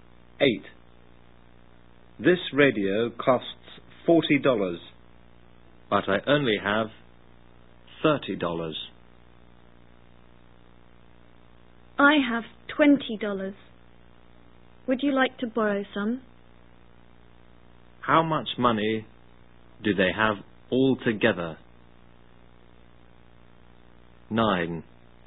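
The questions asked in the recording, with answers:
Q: How much money do they have altogether?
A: $50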